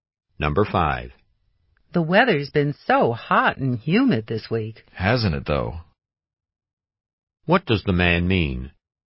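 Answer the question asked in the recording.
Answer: He agrees that the weather has been hot and humid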